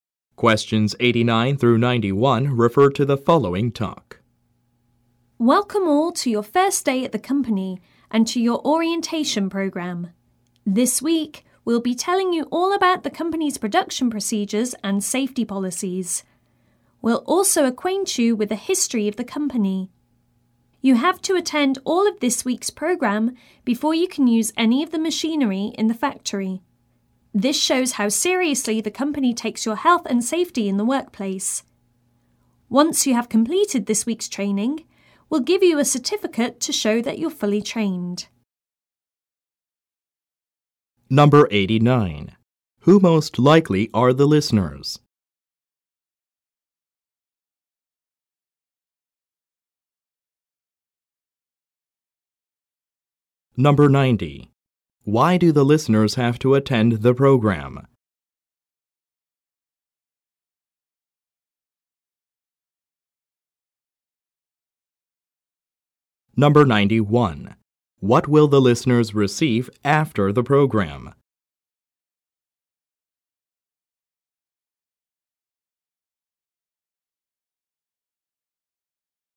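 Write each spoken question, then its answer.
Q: Who most likely are the listeners?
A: New employees

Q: Why do the listeners have to attend the program?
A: To be allowed to use the factory machinery

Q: What will the listeners receive after the program?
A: A certificate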